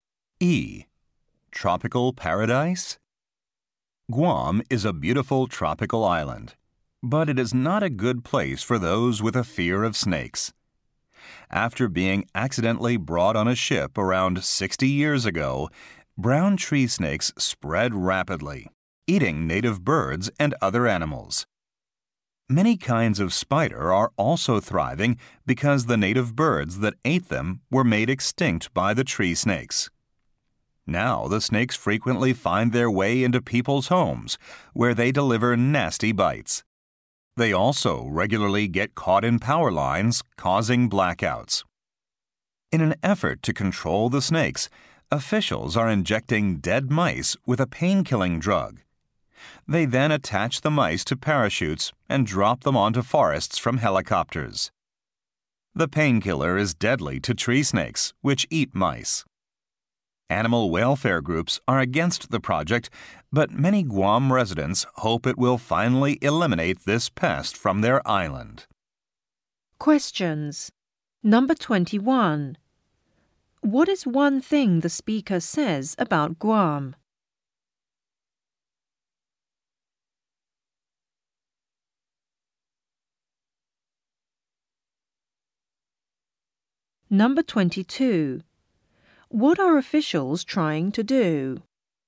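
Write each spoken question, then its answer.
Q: What is one thing the speaker says about Guam?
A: Brown tree snakes have become a major pest there

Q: What are officials trying to do?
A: Kill the tree snakes with drugged mice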